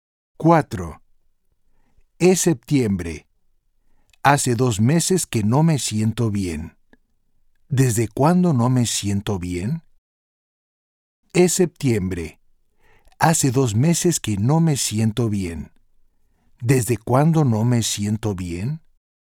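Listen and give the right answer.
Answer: desde julio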